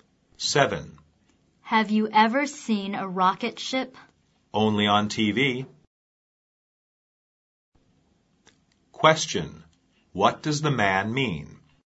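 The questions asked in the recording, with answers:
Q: What does the man mean?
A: He has only seen a rocket ship on TV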